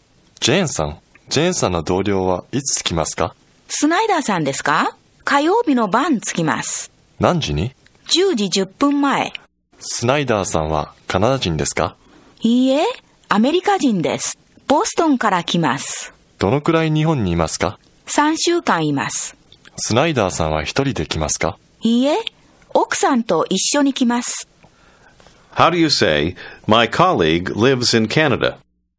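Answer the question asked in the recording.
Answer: 火曜日の晩(10時10分前)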